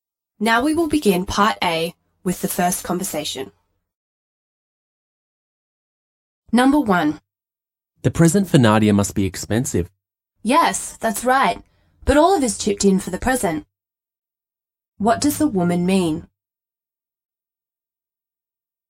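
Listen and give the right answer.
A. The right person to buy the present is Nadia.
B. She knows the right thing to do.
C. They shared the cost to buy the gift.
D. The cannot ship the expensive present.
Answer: C. They shared the cost to buy the gift.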